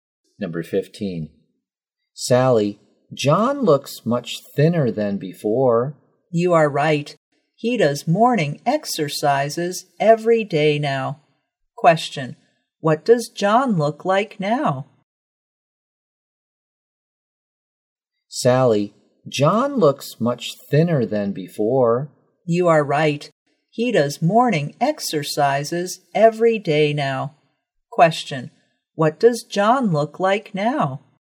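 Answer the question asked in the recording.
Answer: Much thinner than before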